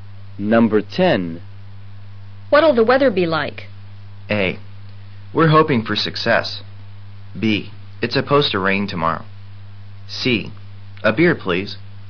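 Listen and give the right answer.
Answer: B: It's supposed to rain tomorrow.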